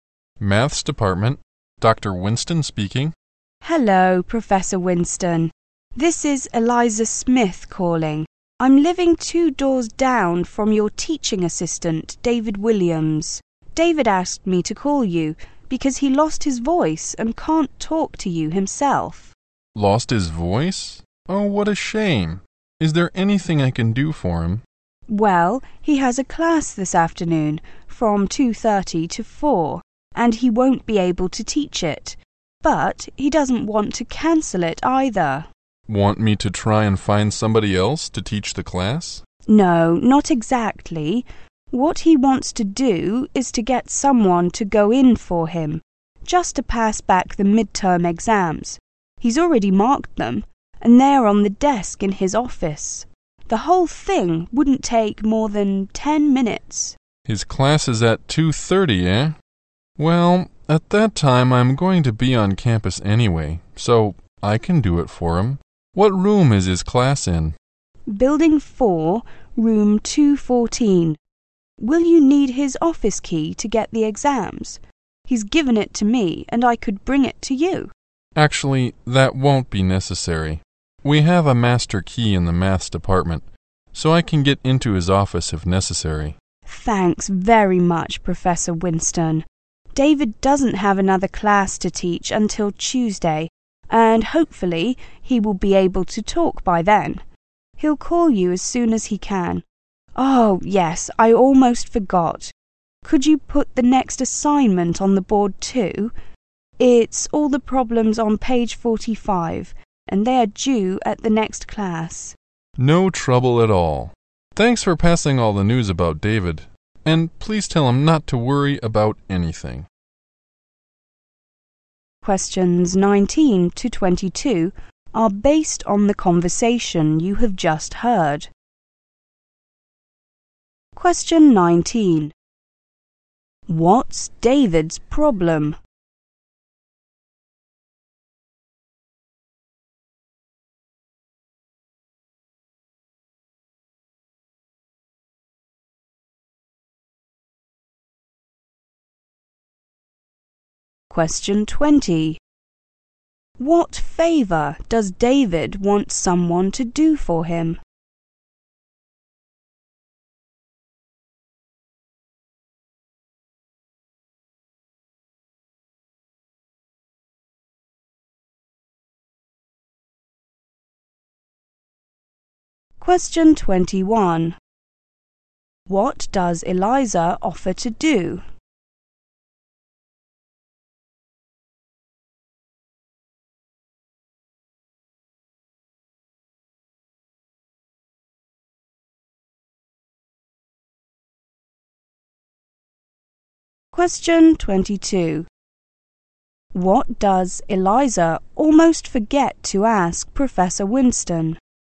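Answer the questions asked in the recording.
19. He has lost his voice
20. Pass back the midterm exams to his class
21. Bring David's office key to the professor
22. To put the next assignment on the board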